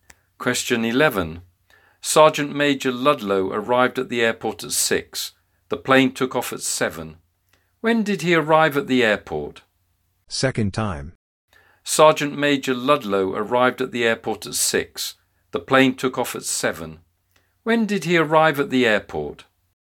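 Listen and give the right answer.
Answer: At 6, an hour before the plane took off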